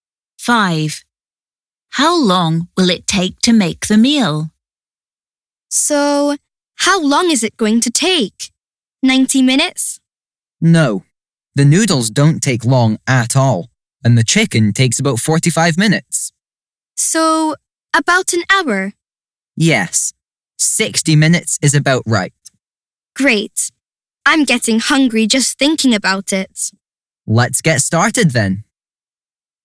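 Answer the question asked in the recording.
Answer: About an hour (60 minutes)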